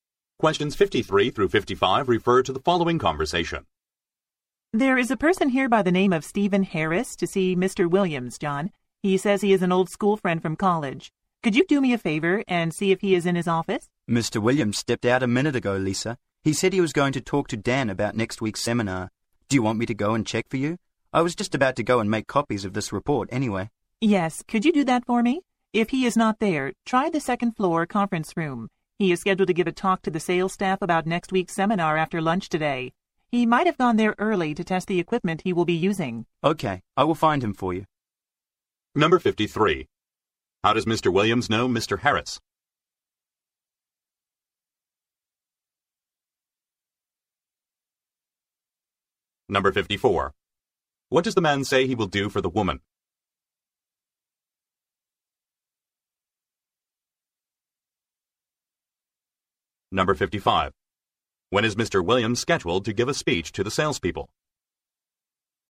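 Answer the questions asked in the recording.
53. They were school friends in college
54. Find Mr. Williams
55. After lunch today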